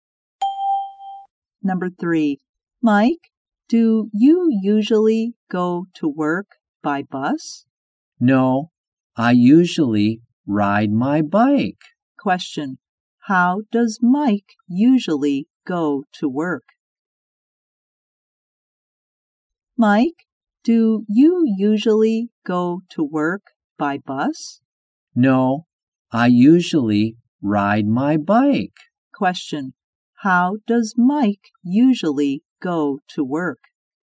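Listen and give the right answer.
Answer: By bike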